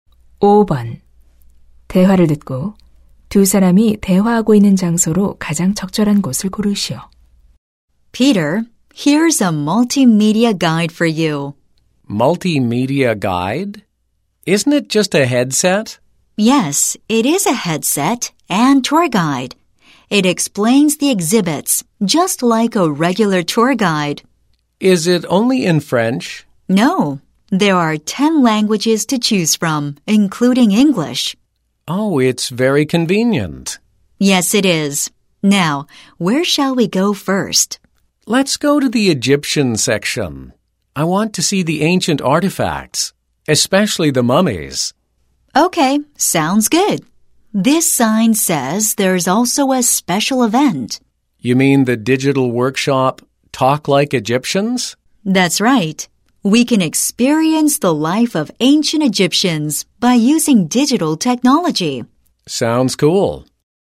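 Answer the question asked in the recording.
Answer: 박물관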